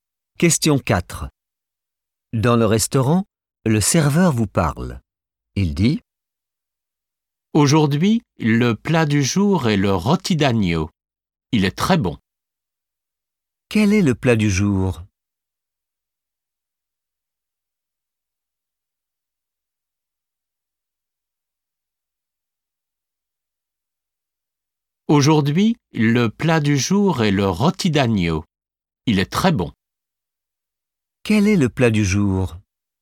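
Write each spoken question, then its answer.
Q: Quel est le plat du jour?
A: le rôti d'agneau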